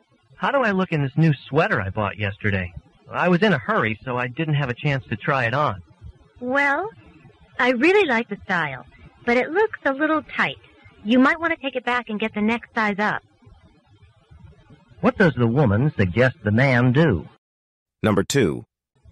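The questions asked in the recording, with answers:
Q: What does the woman suggest the man do?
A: Exchange the sweater for a larger size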